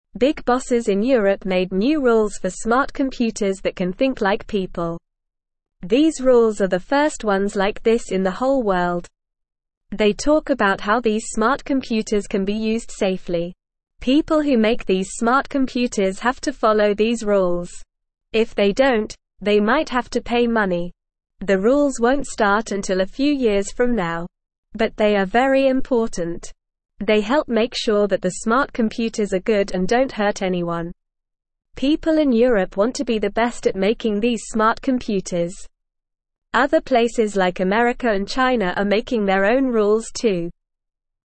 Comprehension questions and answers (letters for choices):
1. Who made new rules for smart computers in Europe?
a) Small bosses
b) Smart computers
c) People in America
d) Big bosses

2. Who wants to be the best at making smart computers?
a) People in America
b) People in China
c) People in Europe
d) People everywhere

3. What might happen if people don't follow the rules?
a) They might get a present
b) They might have to pay money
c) They might get a new computer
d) They might get a job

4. Who else is making their own rules for smart computers?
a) Europe and China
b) Europe and America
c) America and China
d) Europe, America, and China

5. What are the rules for?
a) Smart computers that can't think like people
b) Smart computers that can think like people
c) Dumb computers that can think like people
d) Dumb computers that can't think like people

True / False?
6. The rules won't start until a few years from now.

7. Big bosses in Europe made new rules for smart computers that can think like people.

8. These rules are the first ones like this in the whole world.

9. People who make these smart computers have to follow these rules.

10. Other places like America and China are not making their own rules too.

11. The rules don't talk about how these smart computers can be used safely.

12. The rules are not important to make sure the smart computers are good and don't hurt anyone.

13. If they don't follow the rules, they won't have to pay money.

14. Big bosses in Europe made new (1)______ for smart computers that can think like people.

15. These rules are the first (2)______ like this in the whole world.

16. They talk about how these smart computers can be (3)______ safely.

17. People who (4)______ these smart computers have to follow these rules.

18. They (5)______ make sure that the (6)______ computers are good and don't (7)______ anyone.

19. They (5)______ make sure that the (6)______ computers are good and don't (7)______ anyone.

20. They (5)______ make sure that the (6)______ computers are good and don't (7)______ anyone.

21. People in Europe want to be the (8)______ at making these smart computers.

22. What did the big bosses in Europe make rules for?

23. Are these rules the first ones in the whole world?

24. Who has to follow these rules?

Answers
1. d
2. c
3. b
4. c
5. b
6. True
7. True
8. True
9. True
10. False
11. False
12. False
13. False
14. rules
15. ones
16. used
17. make
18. help
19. smart
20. hurt
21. best
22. They made rules for smart computers that can think like people.
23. Yes, these rules are the first ones in the whole world.
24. The people who make smart computers have to follow these rules.

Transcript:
They talk about how these smart computers can be used safely. If they don't, they might have to pay money.
But they are very important. They help make sure that the smart computers are good and don't hurt anyone. People in Europe want to be the best at making these smart computers. Other places like America and China are making their own rules too.

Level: Level 1